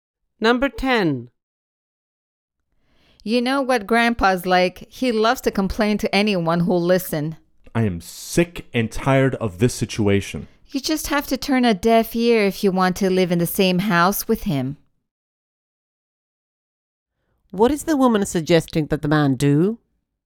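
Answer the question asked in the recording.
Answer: Ignore Grandpa's complaints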